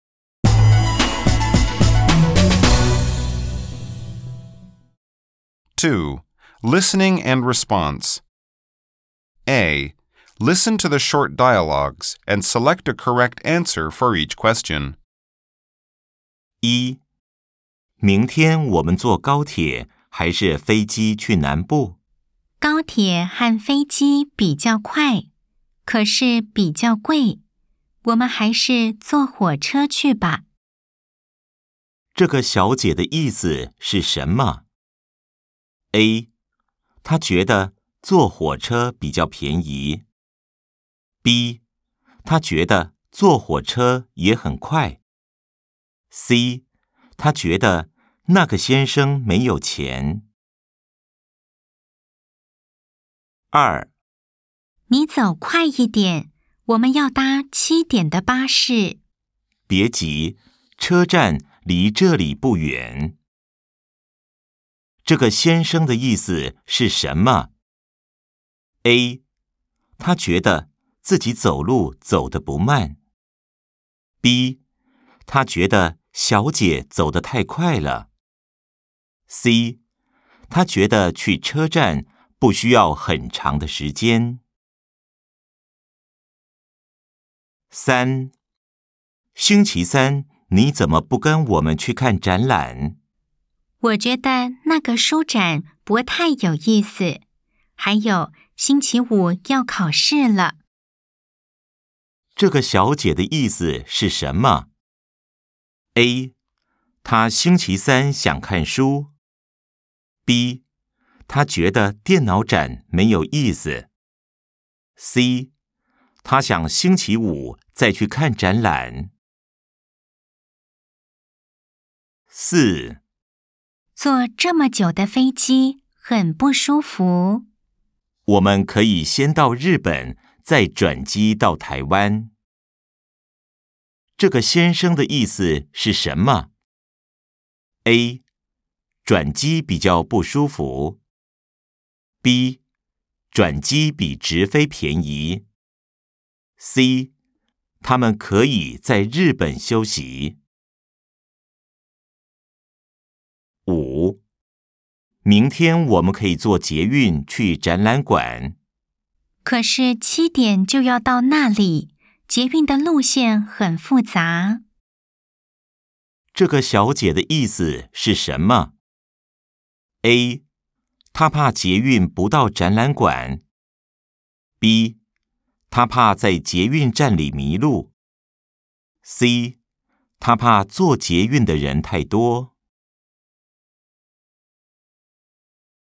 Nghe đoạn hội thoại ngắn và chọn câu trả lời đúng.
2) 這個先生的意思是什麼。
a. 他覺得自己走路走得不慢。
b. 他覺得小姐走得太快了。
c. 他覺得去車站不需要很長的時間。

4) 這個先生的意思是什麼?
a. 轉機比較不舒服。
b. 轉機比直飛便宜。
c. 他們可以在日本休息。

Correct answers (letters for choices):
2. c
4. c

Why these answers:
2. 女: 🔊 你走快一點我們要搭7點的巴士。 Nǚ: Nǐ zǒu kuài yīdiǎn wǒmen yào dā qī diǎn de bāshì. Nữ: Bạn đi nhanh lên một chút, chúng ta phải bắt chuyến xe buýt lúc 7 giờ. 男: 🔊 別急, 車站離這裡不遠。 Nán: Bié jí, chēzhàn lí zhèlǐ bù yuǎn. Nam: Đừng vội, bến xe cách đây không xa.
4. 女: 🔊 坐這麼久的飛機很不舒服。 Nǚ: Zuò zhème jiǔ de fēijī hěn bù shūfu. Nữ: Ngồi máy bay lâu như vậy rất khó chịu. 男: 🔊 我們可以先到日本再轉機到台灣。 Nán: Wǒmen kěyǐ xiān dào Rìběn zài zhuǎnjī dào Táiwān. Nam: Chúng ta có thể bay sang Nhật trước rồi chuyển máy bay sang Đài Loan.